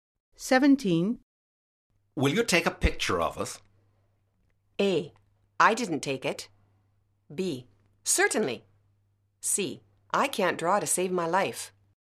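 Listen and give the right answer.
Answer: B: Certainly.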